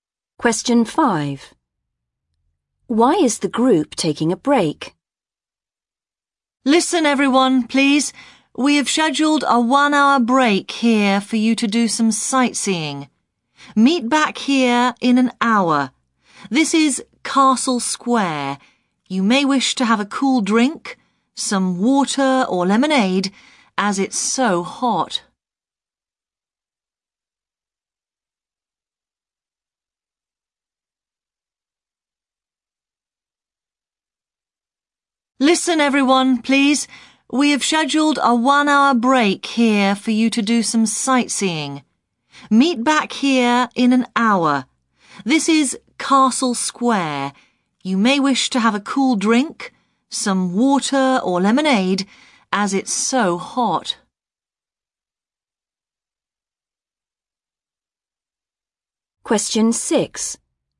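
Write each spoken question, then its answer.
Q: Why is the group taking a break?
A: To do some sightseeing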